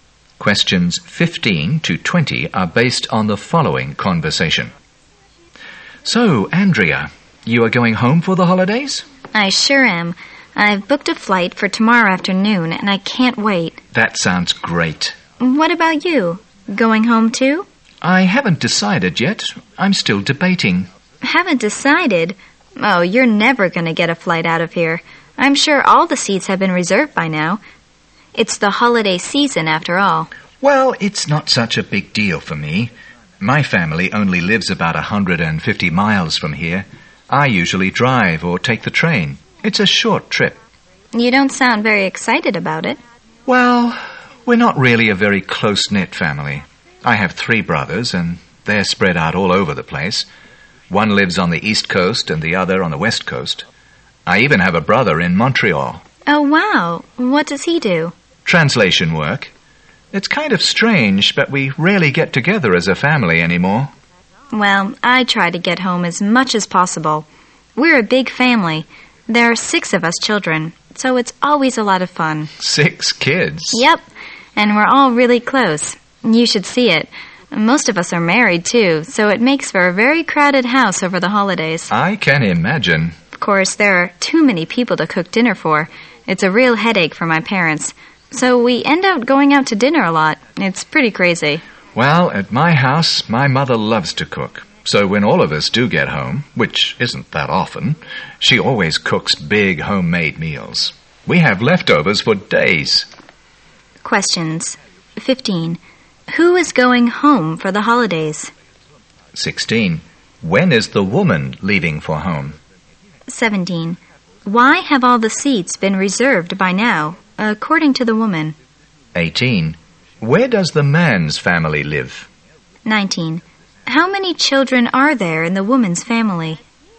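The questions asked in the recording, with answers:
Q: When is the woman leaving for home?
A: Tomorrow afternoon

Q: Why have all the seats been reserved by now, according to the woman?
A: It's the holiday season

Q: Where does the man's family live?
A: About 150 miles away

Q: How many children are there in the woman's family?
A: Six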